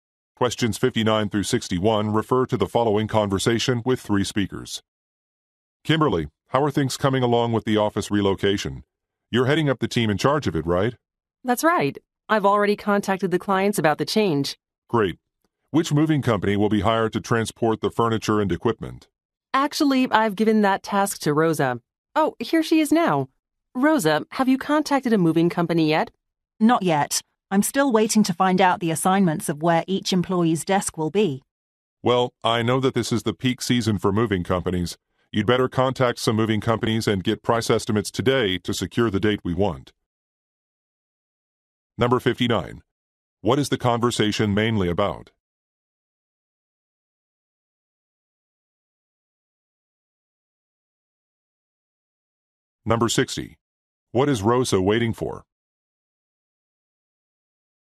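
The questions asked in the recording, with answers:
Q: What is the conversation mainly about?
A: An office relocation

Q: What is Rosa waiting for?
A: Employee desk assignments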